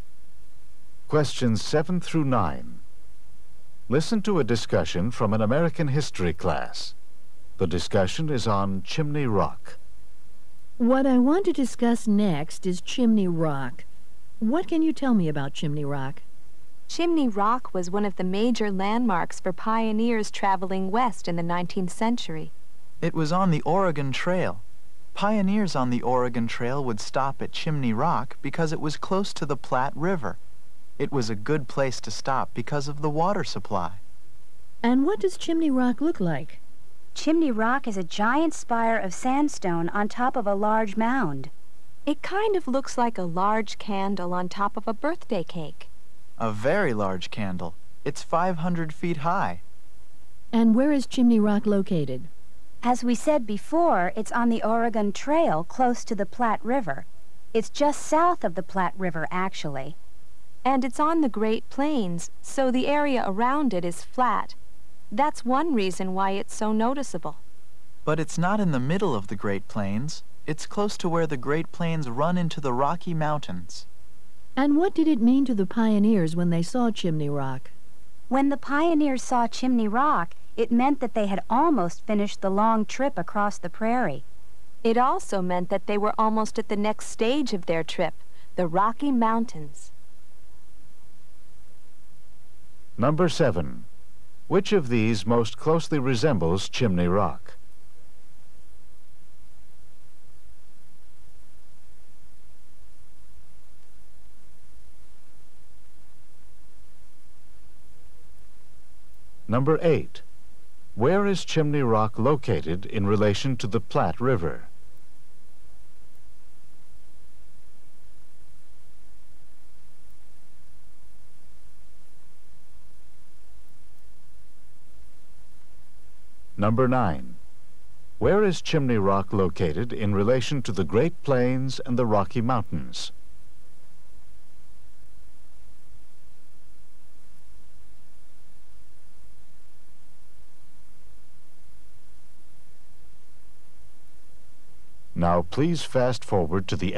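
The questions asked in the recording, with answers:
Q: Where is Chimney Rock located in relation to the Platte River?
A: Just south of it

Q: Where is Chimney Rock located in relation to the Great Plains and the Rocky Mountains?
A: On the Great Plains, close to where they meet the Rocky Mountains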